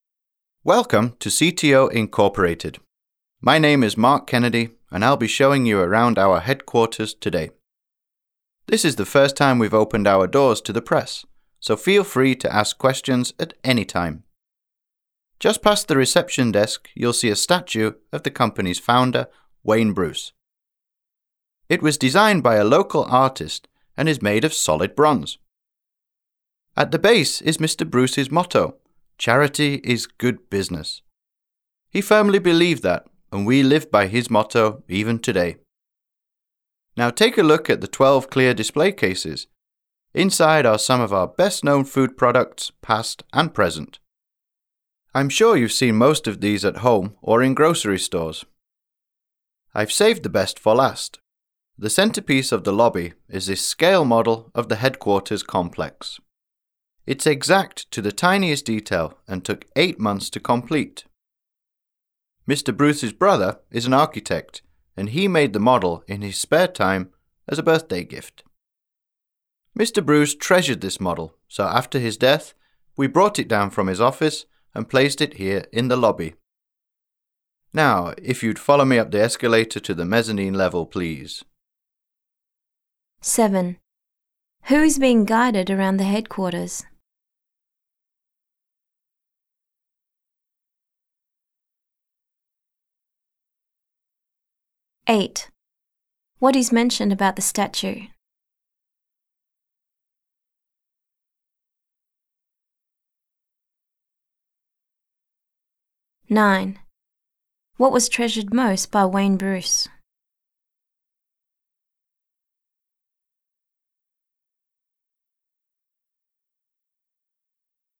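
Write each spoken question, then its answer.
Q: Who is being guided around the headquarters?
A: Members of the press

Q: What was treasured most by Wayne Bruce?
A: The scale model of the headquarters complex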